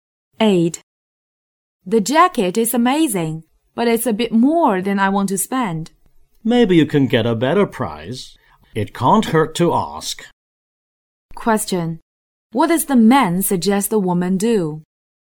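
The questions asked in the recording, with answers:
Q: What does the man suggest the woman do?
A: Ask for a lower price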